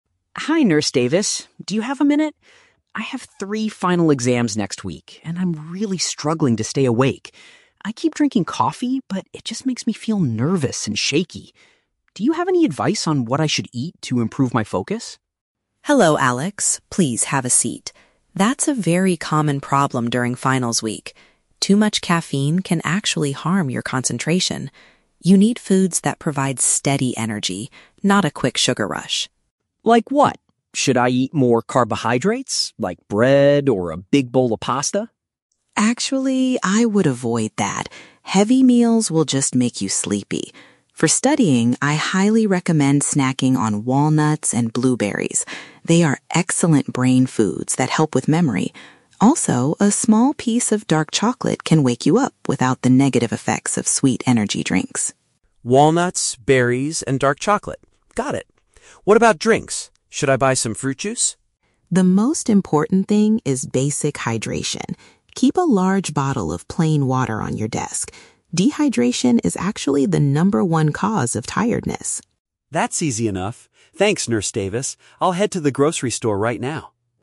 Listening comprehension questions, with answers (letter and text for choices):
Listen to a conversation between a student and a school nurse. For each question, choose the correct answer (A, B, or C).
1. Why is Alex visiting the school health clinic?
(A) He wants to get some medicine for a severe stomachache.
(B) He is looking for dietary tips to help him study better.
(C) He needs a medical document to skip his upcoming tests.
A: (B) He is looking for dietary tips to help him study better.

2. What does the nurse say about eating a big bowl of pasta?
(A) It will cause the student to feel exhausted and want to rest.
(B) It is the best source of long-lasting energy for the brain.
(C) It should always be consumed with a cup of strong coffee.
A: (A) It will cause the student to feel exhausted and want to rest.

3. According to the nurse, what is the primary reason students feel fatigued?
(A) Eating too many sweet snacks while studying.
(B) Staring at their computer screens for too many hours.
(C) Not drinking enough plain water throughout the day.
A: (C) Not drinking enough plain water throughout the day.

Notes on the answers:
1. Alex asks for "advice on what I should eat to improve my focus" because he has exams next week. Option (A) is a trap; it is a clinic, but he is not sick with a stomachache. Option (C) is a trap; he mentions "final exams", but he is not trying to skip them.
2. When Alex asks about eating a big bowl of pasta (heavy meals/carbohydrates), the nurse says, "Heavy meals will just make you sleepy" (which means feeling exhausted and wanting to rest). Option (B) is a trap; it is exactly the opposite of what the nurse advises. Option (C) is a trap; coffee is mentioned earlier as something making Alex feel "nervous and shaky".
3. The nurse states that "Dehydration is actually the number one cause of tiredness." Dehydration means not drinking enough water. Option (A) is a trap; sweet energy drinks and sugar rushes are mentioned as bad, but they are not the number one cause of tiredness. Option (B) is a plausible real-life reason, but it is never mentioned in the audio.

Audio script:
Alex: Hi Nurse Davis. Do you have a minute? I have three final exams next week and I'm really struggling to stay awake. I keep drinking coffee, but it just makes me feel nervous and shaky. Do you have any advice on what I should eat to improve my focus?
Nurse Davis: Hello, Alex. Please, have a seat. That's a very common problem during finals week. Too much caffeine can actually harm your concentration. You need foods that provide steady energy, not a quick sugar rush.
Alex: Like what? Should I eat more carbohydrates, like bread or a big bowl of pasta?
Nurse Davis: Actually, I would avoid that. Heavy meals will just make you sleepy. For studying, I highly recommend snacking on walnuts and blueberries. They are excellent "brain foods" that help with memory. Also, a small piece of dark chocolate can wake you up without the negative effects of sweet energy drinks.
Alex: Walnuts, berries, and dark chocolate. Got it. What about drinks? Should I buy some fruit juice?
Nurse Davis: The most important thing is basic hydration. Keep a large bottle of plain water on your desk. Dehydration is actually the number one cause of tiredness.
Alex: That's easy enough. Thanks, Nurse Davis. I'll head to the grocery store right now.